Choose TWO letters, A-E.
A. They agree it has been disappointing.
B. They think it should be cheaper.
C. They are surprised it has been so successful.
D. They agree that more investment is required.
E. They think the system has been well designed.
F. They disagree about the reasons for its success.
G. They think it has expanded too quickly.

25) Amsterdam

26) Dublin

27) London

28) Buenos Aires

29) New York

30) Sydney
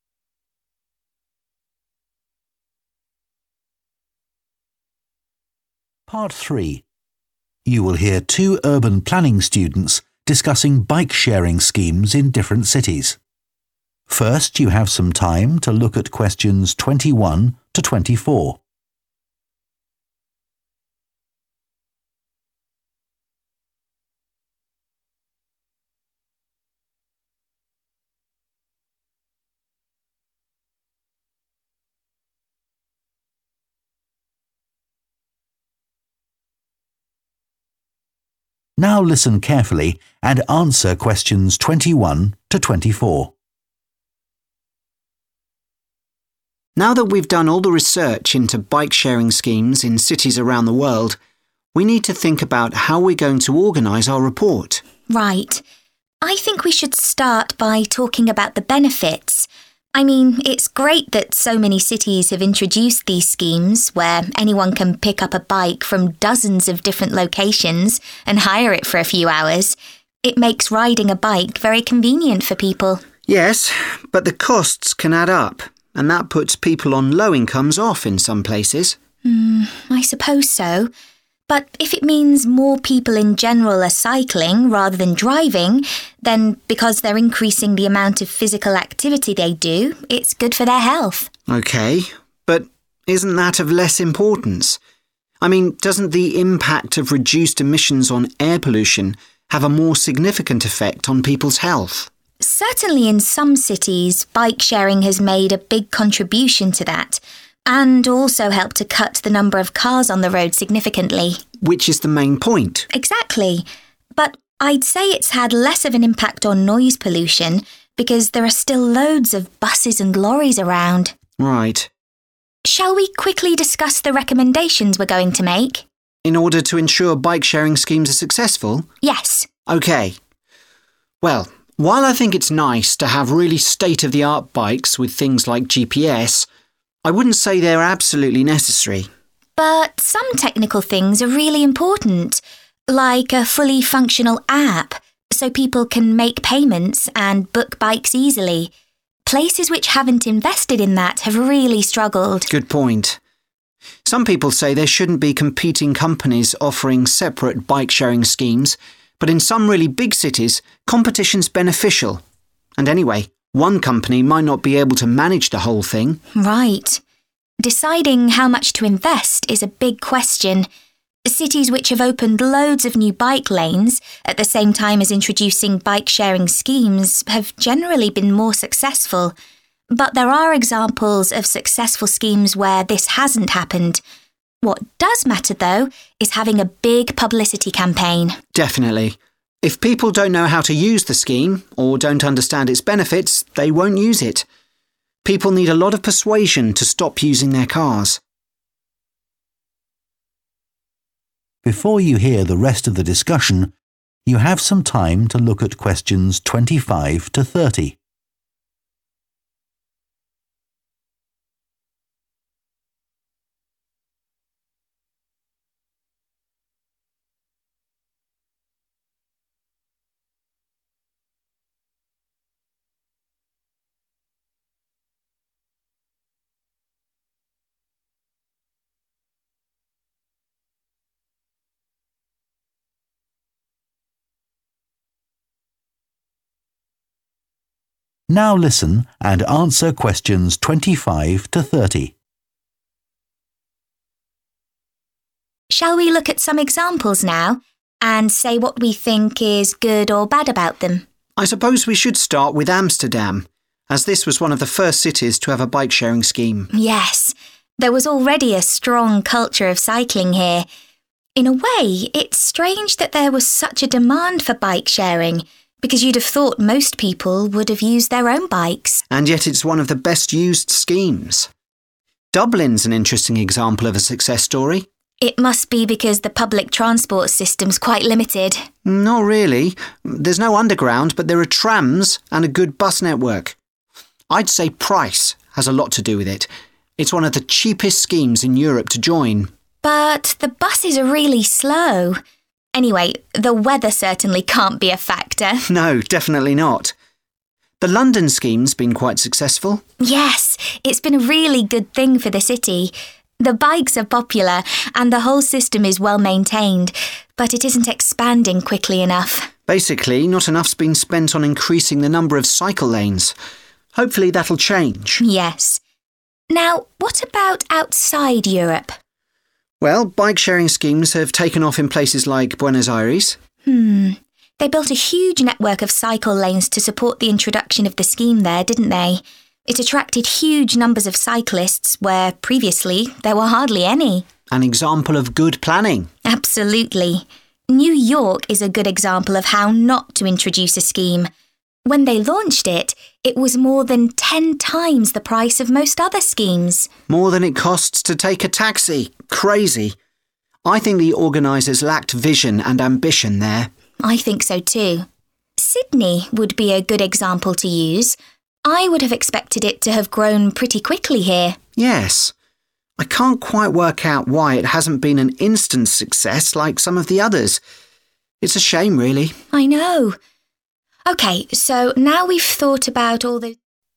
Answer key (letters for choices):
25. C
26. F
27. D
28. E
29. B
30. A